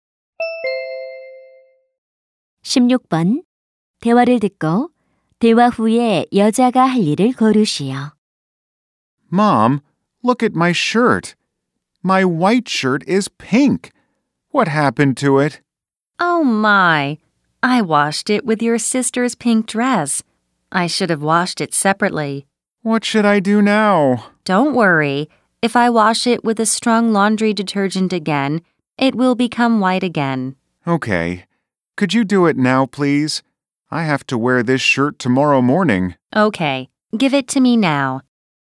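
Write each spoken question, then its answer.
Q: 대화를 듣고 대화 후에 여자가 할 일을 고르시오.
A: 셔츠를 강한 세제로 다시 빨기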